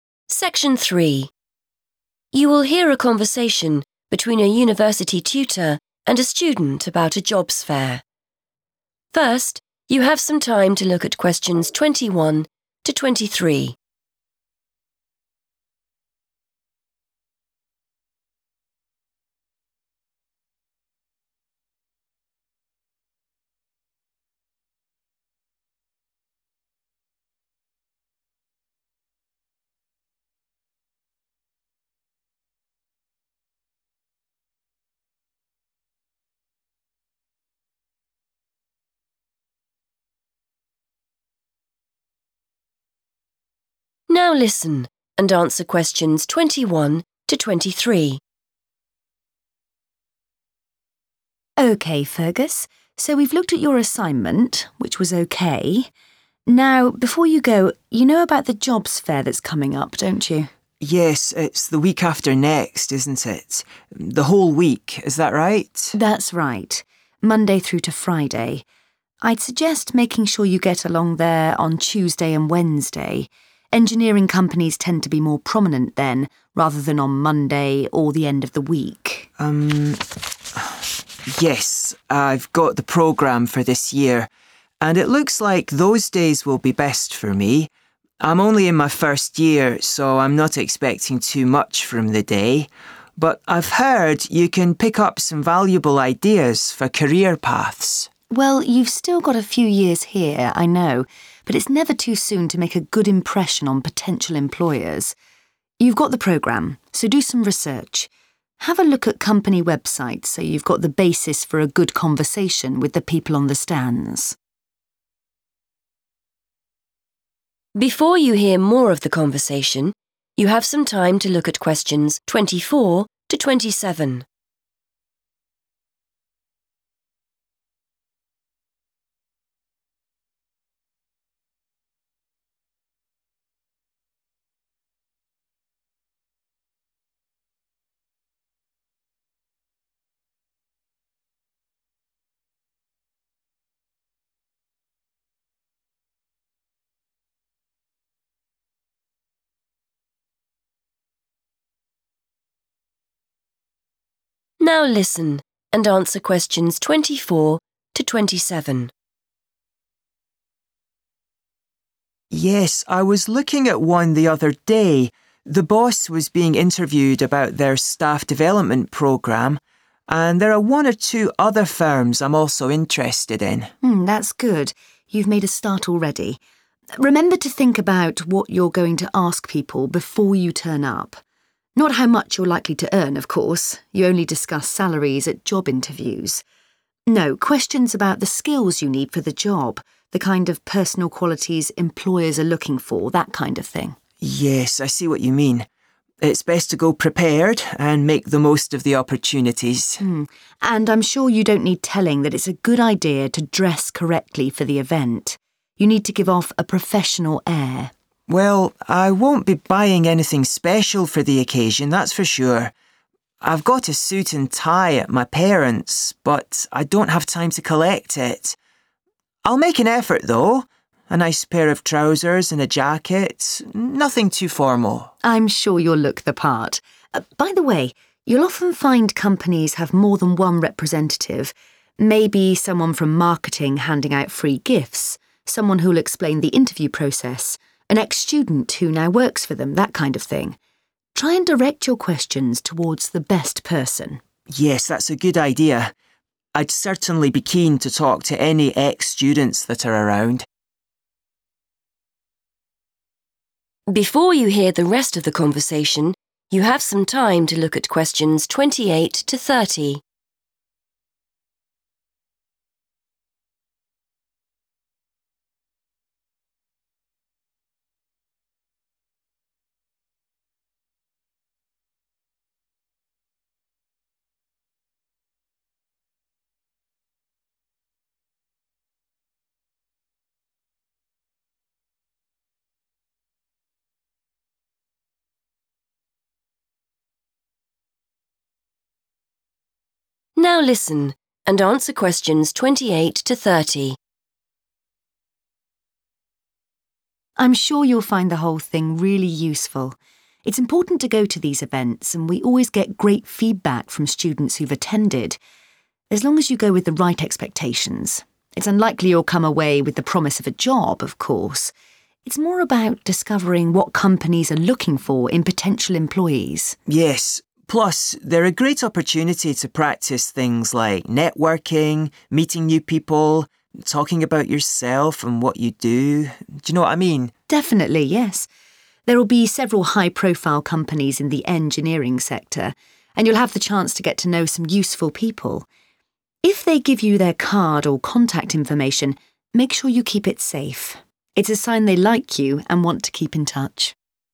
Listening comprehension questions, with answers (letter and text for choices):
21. The best days for engineering students are 21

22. Students can get useful suggestions about 22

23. Use the internet to look at _____ before the event.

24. Fergus says that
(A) there is one company he is particularly interested in.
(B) he has done some research already.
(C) he knows the boss at one of the companies.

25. The tutor thinks Fergus should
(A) prepare questions in advance.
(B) research the skills required for jobs before the event.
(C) find out what the starting salaries are.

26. Fergus plans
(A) to wear a suit and tie.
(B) to wear smart but casual clothes.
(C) to buy an outfit for the event.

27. The tutor suggests that Fergus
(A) should ask particular people certain questions.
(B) should avoid taking free gifts.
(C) should treat conversations like short interviews.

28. Why do the tutor and Fergus think it is useful to attend a jobs fair?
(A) to get a job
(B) to find out what employers want from you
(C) to give employers your contact details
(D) to discover which are the key companies to work for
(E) to practise your communication skills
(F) to make useful contacts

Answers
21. Tuesday and Wednesday
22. career paths
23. company websites
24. (B) he has done some research already.
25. (A) prepare questions in advance.
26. (B) to wear smart but casual clothes.
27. (A) should ask particular people certain questions.
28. (B) to find out what employers want from you

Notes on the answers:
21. The correct answer is Tuesday and Wednesday because the tutor tells Fergus that engineering companies are more 'prominent' on those two days. In this context, 'prominent' means that more of these companies will be present or have a bigger display. Fergus looks at the schedule (the programme) and agrees that those are the best days for him.
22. The correct answer is "career paths" because Fergus says he heard the jobs fair is a good place to get "valuable ideas" for his future. In the question, the phrase "useful suggestions" means the same thing as "valuable ideas."
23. The correct answer is "company websites" because the tutor tells the student to do some research before the event. Specifically, the tutor suggests checking these online pages so the student can have a better conversation with the people at the fair. The phrase "look at" in the task matches the tutor's advice in the transcript.
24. The correct answer is B because Fergus mentions that he recently visited a company's website and saw an interview with a manager. The tutor confirms this is a good first step by saying, 'You've made a start already.' This shows Fergus is being proactive and doing research (looking for facts or info) before the event begins.
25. The correct answer is A because the teacher tells Fergus to plan his questions early. She says he should think about what to ask before he arrives. She specifically tells him to avoid talking about money (salary) and instead suggests he ask the people at the event about the skills they need for the job. This shows that he should ask these questions at the event rather than researching them all beforehand.
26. The correct answer is B because Fergus explains that he cannot get his suit and tie from his parents' house and he does not want to buy new clothes. He decides to wear a jacket and nice trousers instead. He describes this choice as 'nothing too formal,' which is another way of saying 'smart but casual.'
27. The correct answer is A because the teacher tells Fergus to 'direct' his questions to the 'best person'. The teacher explains that companies have different workers there, such as marketing staff or former students. Therefore, Fergus should ask specific questions to the particular person who knows the most about that topic.
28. The correct answer identifies three main benefits mentioned in the dialogue. First, the tutor explains that the fair is useful for learning about the needs of a company, or "what companies are looking for." Second, Fergus points out that it is a great way to practice "networking" and talking about one's work, which relates to communication skills. Finally, the tutor notes that students can meet and "get to know some useful people," which refers to making professional contacts. Other options like getting a job are dismissed by the tutor as "unlikely" to happen directly at the fair.

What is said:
Tutor: OK, Fergus, so we've looked at your assignment, which was OK. Now, before you go, you know about the jobs fair that's coming up, don't you?
Fergus: Yes, it's the week after next, isn't it? The whole week, is that right?
Tutor: That's right. Monday through to Friday. I'd suggest making sure you get along there on Tuesday and Wednesday. Engineering companies tend to be more prominent then rather than on Monday or the end of the week.
Fergus: Um, yes, I've got the programme for this year. And it looks like those days will be best for me. I'm only in my first year, so I'm not expecting too much from the day. But I've heard you can pick up some valuable ideas for career paths.
Tutor: Well, you've still got a few years here, I know, but it's never too soon to make a good impression on potential employers. You've got the programme, so do some research. Have a look at company websites so you've got the basis for a good conversation with the people on the stands.
Fergus: Yes, I was looking at one the other day. The boss was being interviewed about their staff development programme, and there are one or two other firms I'm also interested in.
Tutor: Mm, that's good. You've made a start already. Remember to think about what you're going to ask people before you turn up. Not how much you're likely to earn, of course! You only discuss salaries at job interviews. No, questions about the skills you need for the job, the kind of personal qualities employers are looking for, that kind of thing.
Fergus: Yes, I see what you mean. It's best to go prepared and make the most of the opportunities.
Tutor: And I'm sure you don't need telling that it's a good idea to dress correctly for the event. You need to give off a professional air.
Fergus: Well, I won't be buying anything special for the occasion, that's for sure. I've got a suit and tie at my parents' but I don't have time to collect it. I'll make an effort, though. A nice pair of trousers and a jacket, nothing too formal.
Tutor: I'm sure you'll look the part. By the way, you'll often find companies have more than one representative, maybe someone from marketing handing out free gifts, someone who'll explain the interview process, an ex-student who now works for them, that kind of thing. Try and direct your questions towards the best person.
Fergus: Yes, that's a good idea. I'd certainly be keen to talk to any ex-students that are around.
Tutor: I'm sure you'll find the whole thing really useful. It's important to go to these events, and we always get great feedback from students who've attended. As long as you go with the right expectations. It's unlikely you'll come away with the promise of a job, of course. It's more about discovering what companies are looking for in potential employees.
Fergus: Yes, plus they're a great opportunity to practise things like networking, meeting new people, talking about yourself and what you do, d'you know what I mean?
Tutor: Definitely, yes. There'll be several high-profile companies in the engineering sector, and you'll have the chance to get to know some useful people. If they give you their card or contact information, make sure you keep it safe. It's a sign they like you and want you to keep in touch.